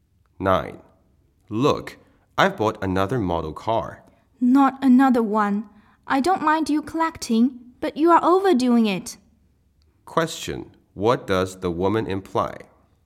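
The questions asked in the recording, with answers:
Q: What does the woman imply?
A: The man has bought too many model cars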